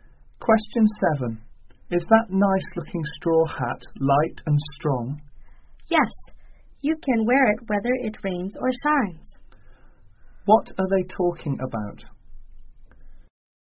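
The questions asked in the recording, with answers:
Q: What are they talking about?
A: A straw hat.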